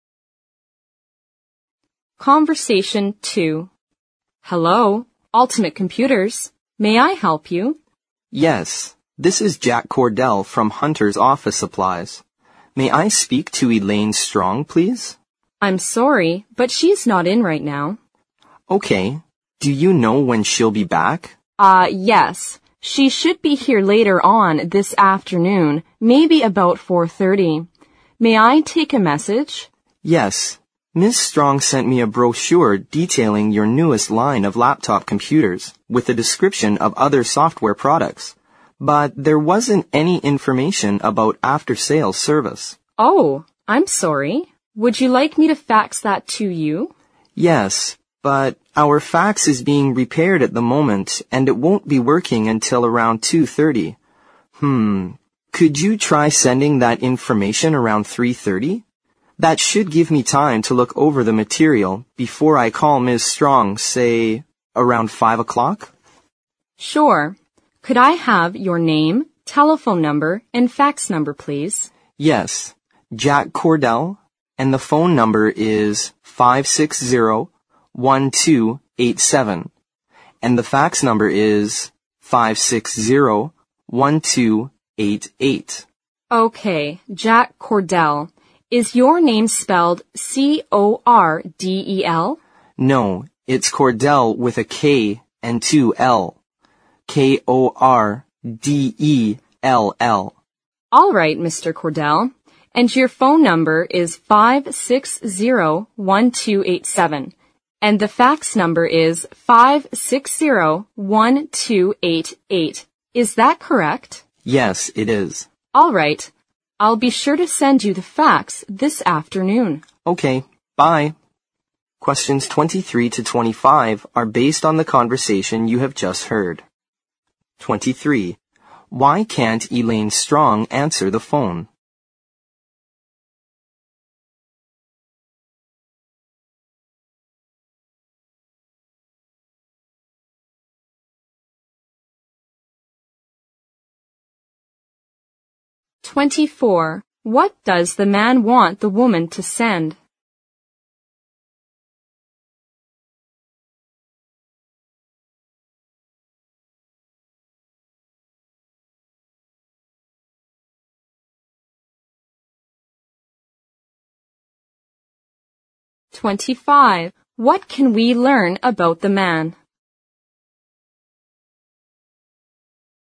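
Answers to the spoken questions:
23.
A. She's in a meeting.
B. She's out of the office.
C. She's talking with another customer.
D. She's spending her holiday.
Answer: B. She's out of the office.
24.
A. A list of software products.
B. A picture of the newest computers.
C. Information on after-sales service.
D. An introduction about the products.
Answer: C. Information on after-sales service.
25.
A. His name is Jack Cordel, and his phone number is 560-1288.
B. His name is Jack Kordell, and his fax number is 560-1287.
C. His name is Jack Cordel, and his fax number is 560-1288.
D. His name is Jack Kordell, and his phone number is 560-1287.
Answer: D. His name is Jack Kordell, and his phone number is 560-1287.

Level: 四级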